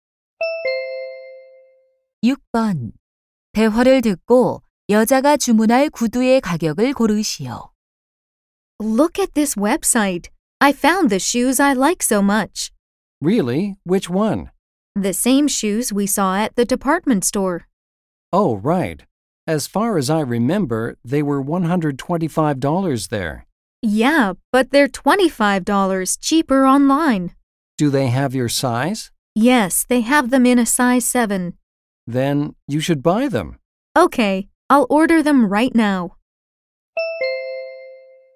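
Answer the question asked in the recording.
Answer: 100달러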